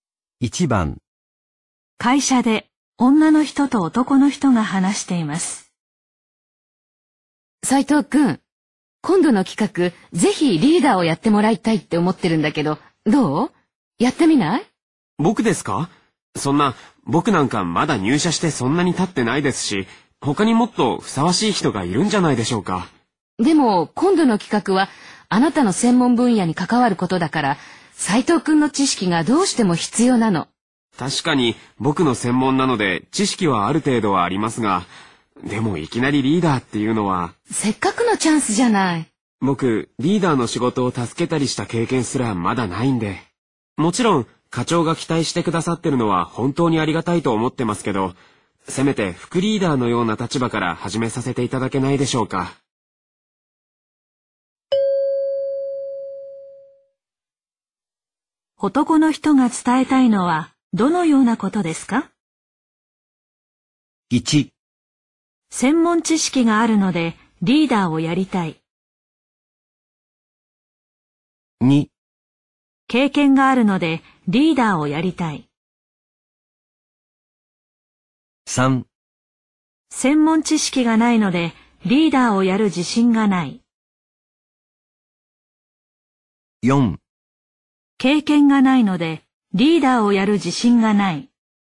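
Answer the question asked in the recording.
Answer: 4: 経験がないのでリーダーをやる自信がない。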